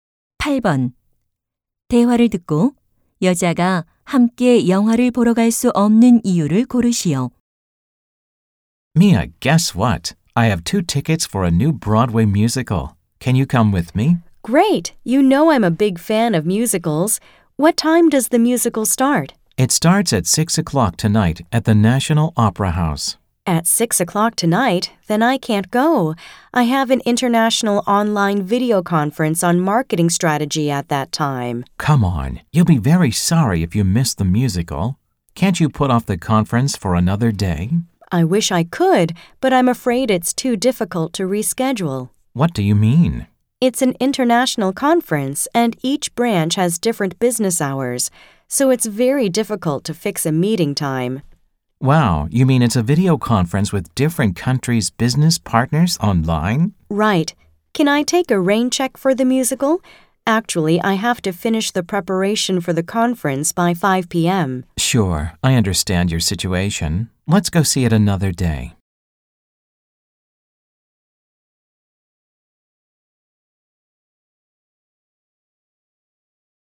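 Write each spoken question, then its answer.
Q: 대화를 듣고 여자가 함께 영화를 보러 갈 수 없는 이유를 고르시오.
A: 국제 온라인 화상 회의가 있어서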